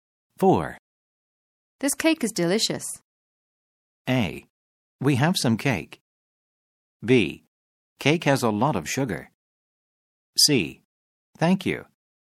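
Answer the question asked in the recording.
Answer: C: Thank you.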